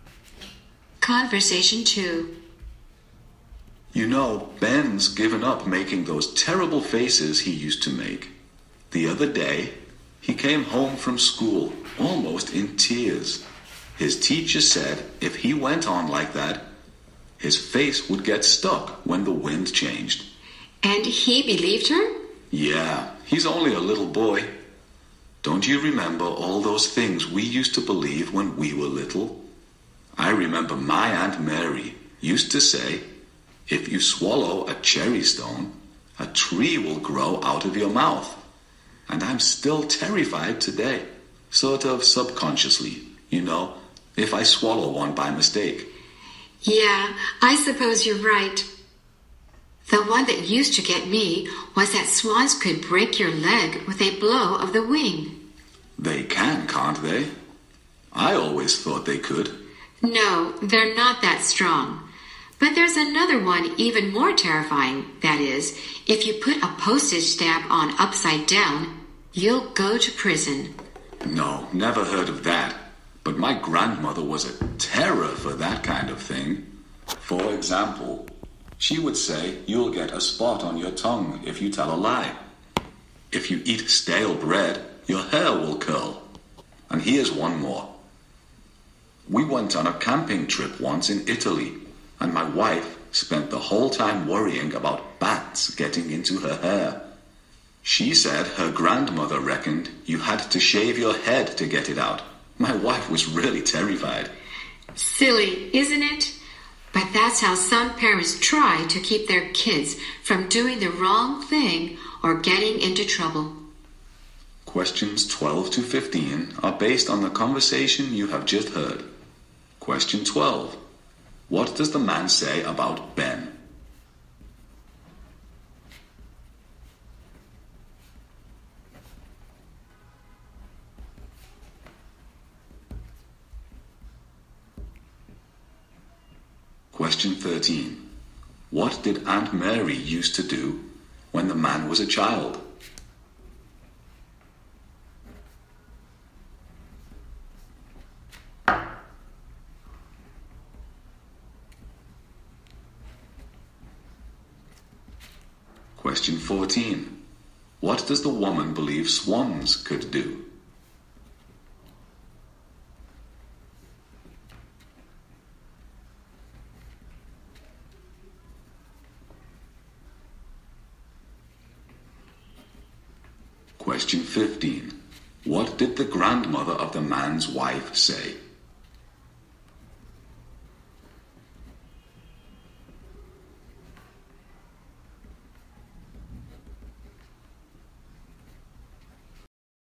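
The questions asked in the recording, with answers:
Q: What does the man say about Ben?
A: He has stopped making terrible faces because his teacher said his face would get stuck

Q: What did Aunt Mary used to do when the man was a child?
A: She told him a tree would grow out of his mouth if he swallowed a cherry stone

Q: What does the woman believe swans could do?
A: Break your leg with a blow of the wing

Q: What did the grandmother of the man's wife say?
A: You had to shave your head to get a bat out of your hair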